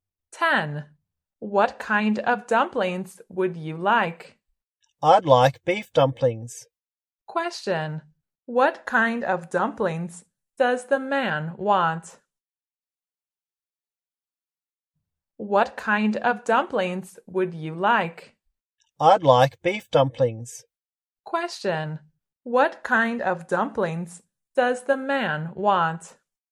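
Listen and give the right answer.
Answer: Beef dumplings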